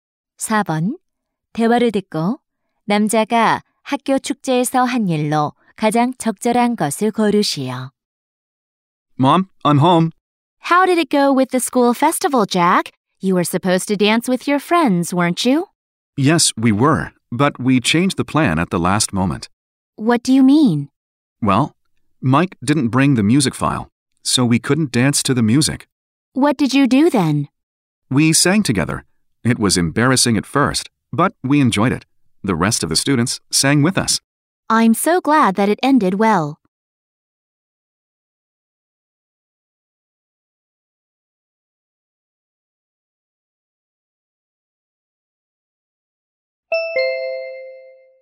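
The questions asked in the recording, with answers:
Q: 대화를 듣고 남자가 학교 축제에서 한 일로 가장 적절한 것을 고르시오.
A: 친구들과 함께 노래를 불렀다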